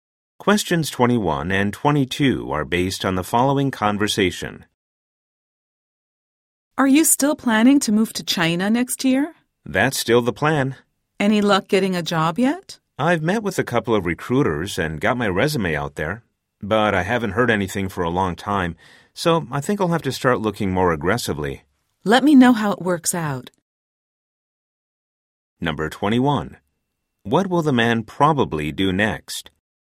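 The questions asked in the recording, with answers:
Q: What will the man probably do next?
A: Look for a job more aggressively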